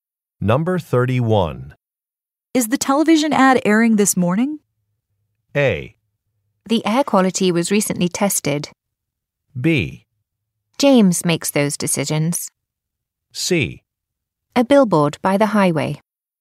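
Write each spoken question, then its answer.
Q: Is the television ad airing this morning?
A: B: James makes those decisions.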